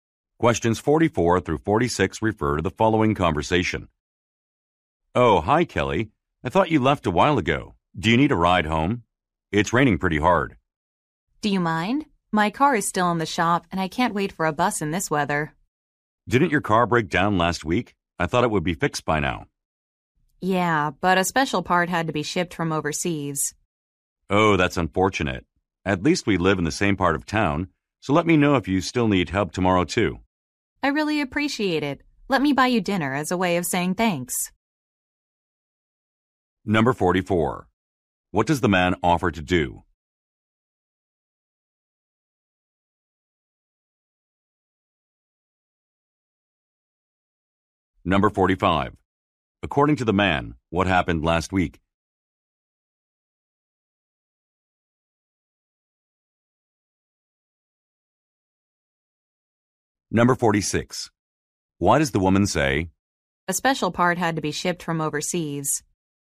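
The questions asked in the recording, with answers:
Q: What does the man offer to do?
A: Give the woman a ride home

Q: According to the man, what happened last week?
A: The woman's car broke down

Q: Why does the woman say,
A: To explain why her car is still not repaired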